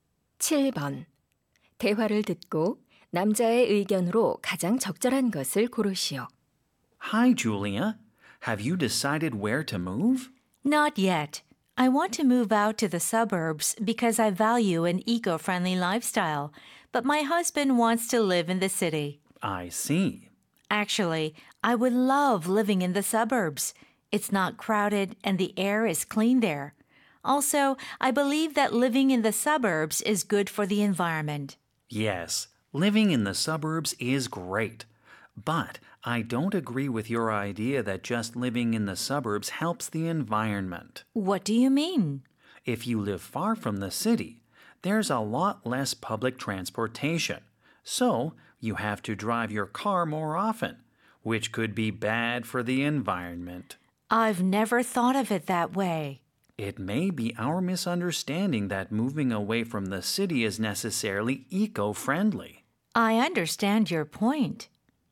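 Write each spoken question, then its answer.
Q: 대화를 듣고 남자의 의견으로 가장 적절한 것을 고르시오.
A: 교외에 사는 것이 반드시 친환경적인 것은 아니다.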